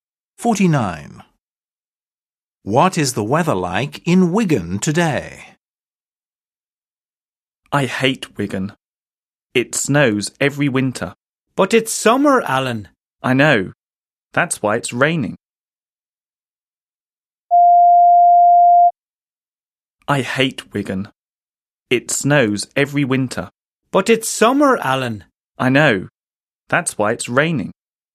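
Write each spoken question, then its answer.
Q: What is the weather like in Wigan today?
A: raining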